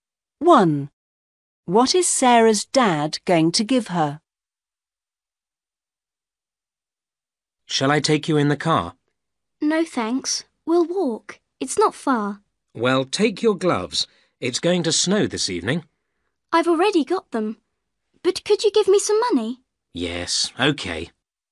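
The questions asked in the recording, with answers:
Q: What is Sarah's dad going to give her?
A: money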